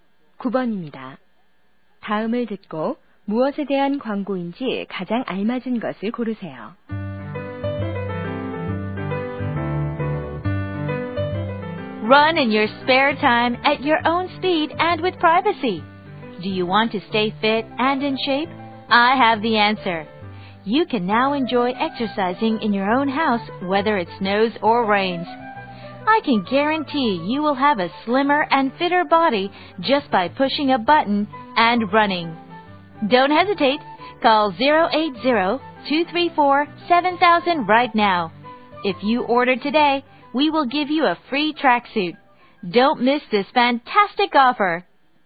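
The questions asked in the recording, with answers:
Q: 다음을 듣고 무엇에 대한 광고인지 가장 알맞은 것을 고르세요.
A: 러닝머신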